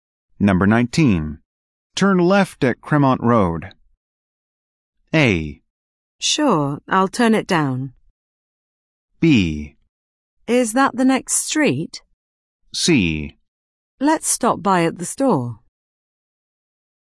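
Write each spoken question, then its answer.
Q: Turn left at Cremont Road.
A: B: Is that the next street?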